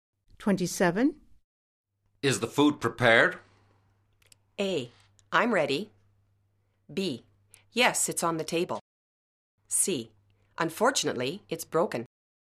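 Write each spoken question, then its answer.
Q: Is the food prepared?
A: B: Yes, it's on the table.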